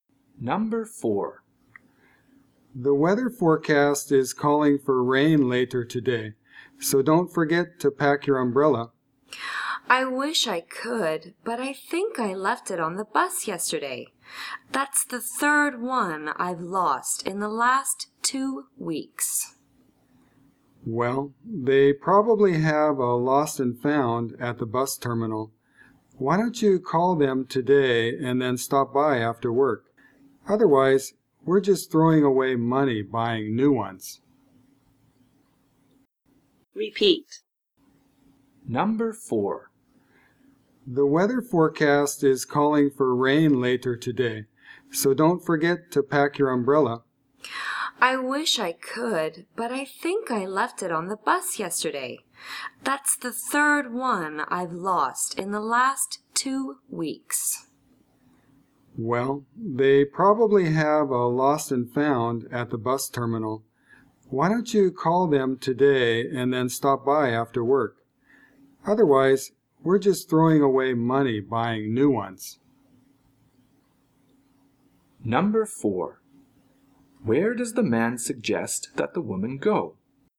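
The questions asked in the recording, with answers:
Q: Where does the man suggest that the woman go?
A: To the lost and found at the bus terminal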